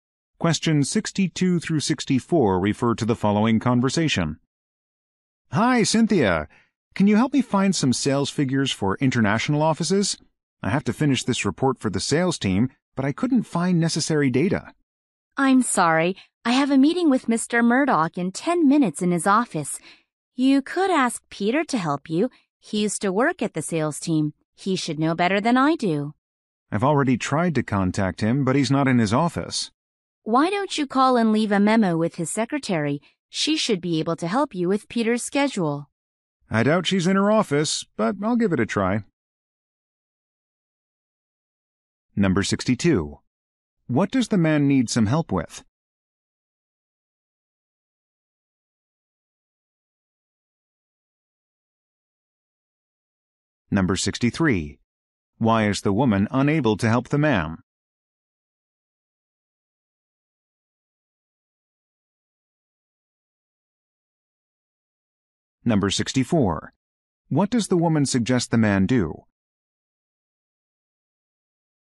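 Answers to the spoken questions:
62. Finding sales figures for international offices
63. She has a meeting soon
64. Leave a memo with Peter's secretary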